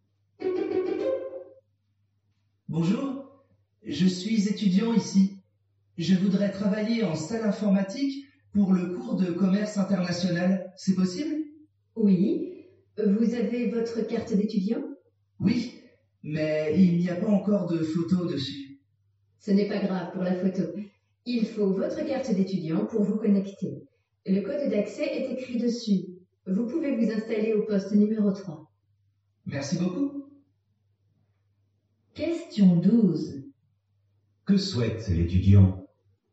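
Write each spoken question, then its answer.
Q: Que souhaite l'étudiant?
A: Travailler en salle informatique.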